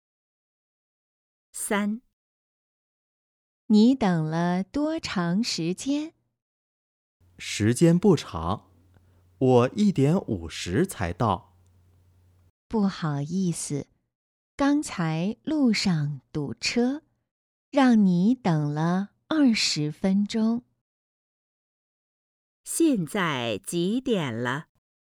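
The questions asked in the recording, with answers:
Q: 现在几点了?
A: 2:10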